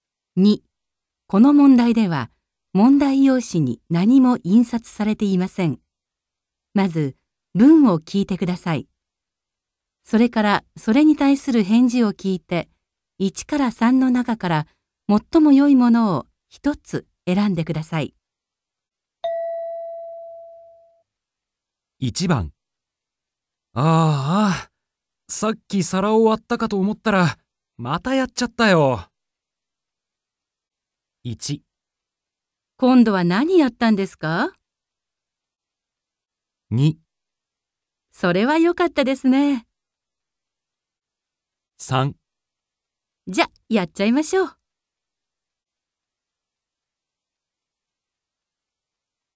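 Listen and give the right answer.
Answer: 今度は何やったんですか。

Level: N2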